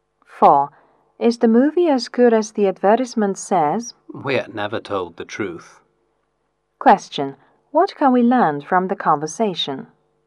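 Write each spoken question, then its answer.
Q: What can we learn from the conversation?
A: The ad doesn't tell the truth; the movie isn't as good as advertised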